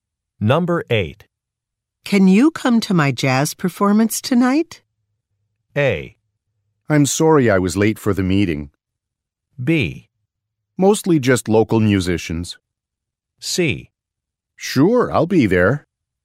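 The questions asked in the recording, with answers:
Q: Can you come to my jazz performance tonight?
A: C: Sure, I'll be there.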